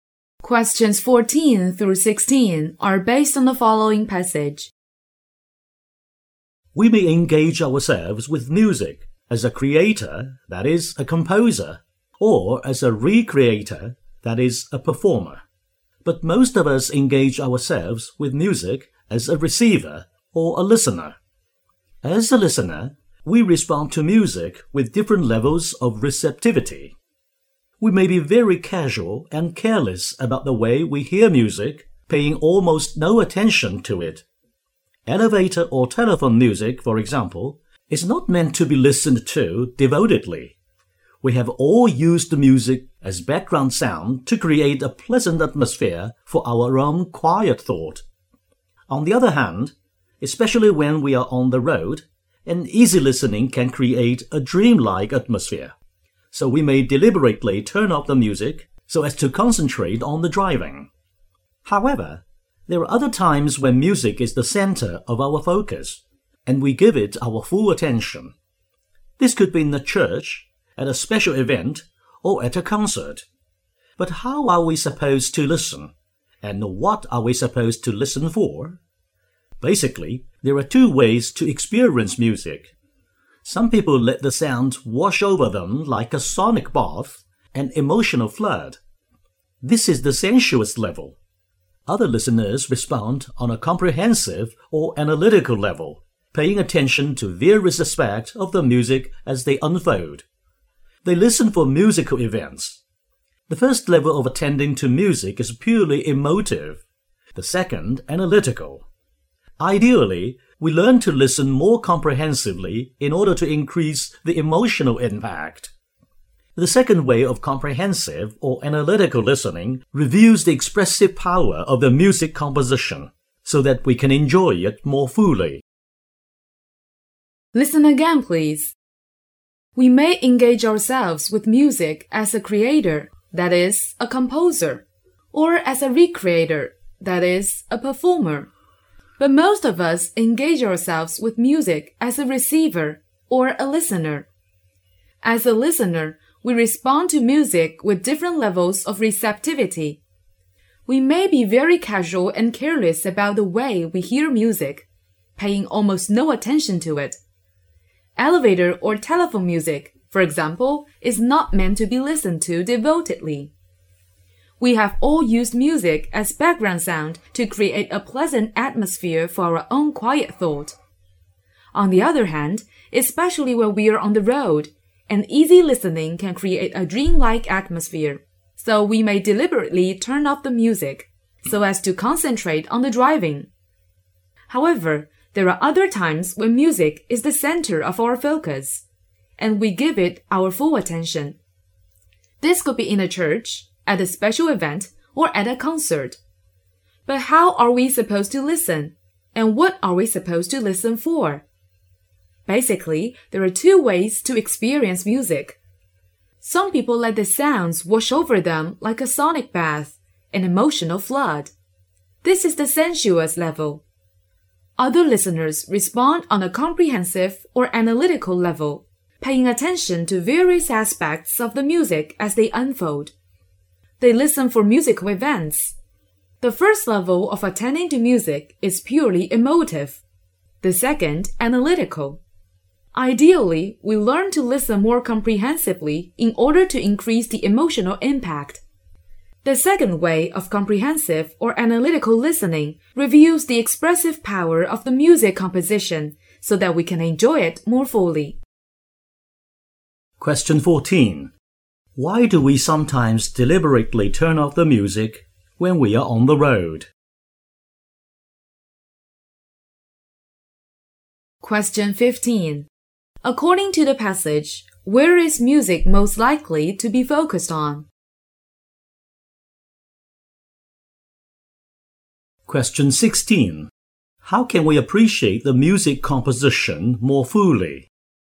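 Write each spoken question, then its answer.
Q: Why do we sometimes deliberately turn off the music when we are on the road?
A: To concentrate on driving

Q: According to the passage, where is music most likely to be focused on?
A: In a church, at a special event, or at a concert

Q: How can we appreciate the music composition more fully?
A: By listening comprehensively or analytically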